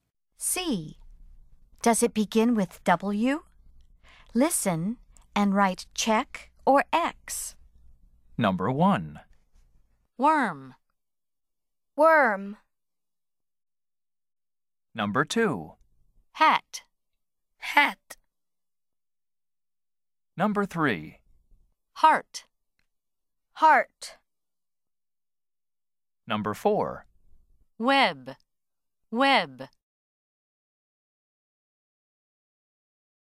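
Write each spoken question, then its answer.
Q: Does it begin with W?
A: Yes (worm)

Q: Does it begin with W?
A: No (hat)

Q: Does it begin with W?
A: No (heart)

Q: Does it begin with W?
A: Yes (web)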